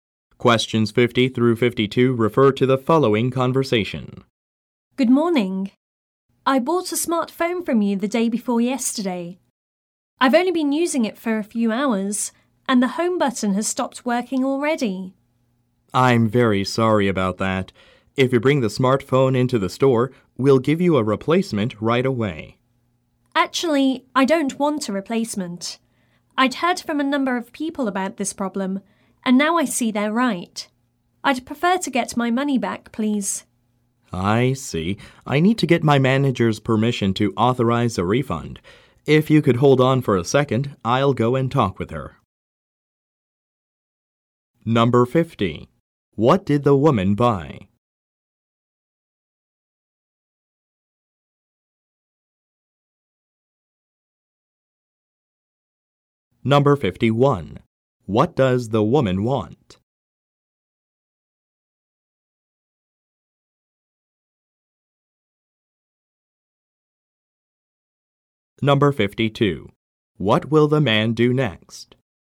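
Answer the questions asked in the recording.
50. A smartphone
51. A refund (her money back)
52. Talk with his manager to get permission for a refund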